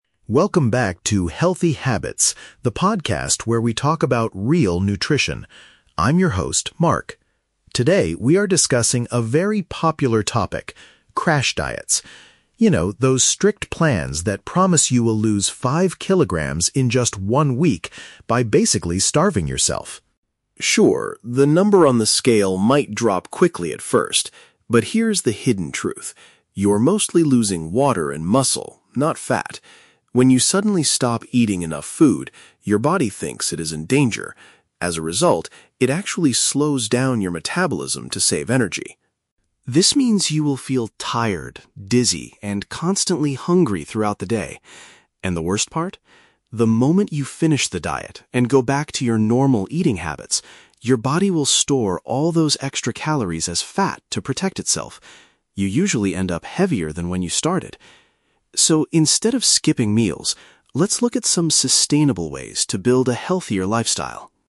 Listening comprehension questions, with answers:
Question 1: What is the main subject of today's podcast episode?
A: The negative effects of extreme weight-loss programs.

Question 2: What happens to the human body when a person severely limits their food intake?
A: It reduces the speed at which it naturally uses energy.

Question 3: According to the host, what is the most common result after someone finishes a crash diet?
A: They regain more weight than they originally lost.

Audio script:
Host: Welcome back to 'Healthy Habits,' the podcast where we talk about real nutrition. I'm your host, Mark. Today, we are discussing a very popular topic: crash diets. You know, those strict plans that promise you will lose five kilograms in just one week by basically starving yourself.
Sure, the number on the scale might drop quickly at first. But here is the hidden truth: you are mostly losing water and muscle, not fat. When you suddenly stop eating enough food, your body thinks it is in danger. As a result, it actually slows down your metabolism to save energy.
This means you will feel tired, dizzy, and constantly hungry throughout the day. And the worst part? The moment you finish the diet and go back to your normal eating habits, your body will store all those extra calories as fat to protect itself. You usually end up heavier than when you started! So, instead of skipping meals, let's look at some sustainable ways to build a healthier lifestyle...